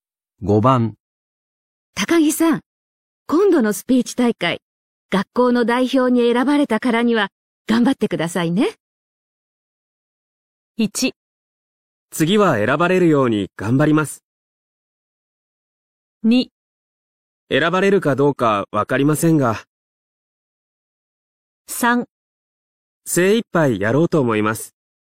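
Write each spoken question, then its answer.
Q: 高木さん、今度のスピーチ大会、学校の代表に選ばれたからには頑張ってくださいね。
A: 3: 精一杯やろうと思います。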